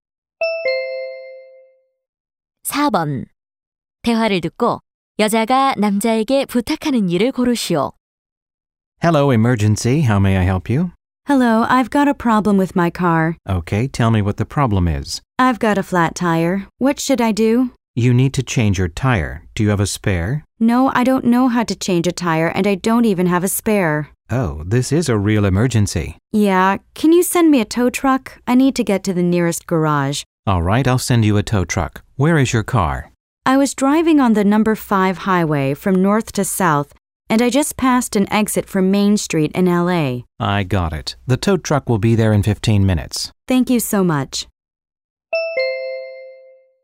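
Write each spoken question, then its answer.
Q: 대화를 듣고 여자가 남자에게 부탁하는 일을 고르시오.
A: 견인차 보내 주기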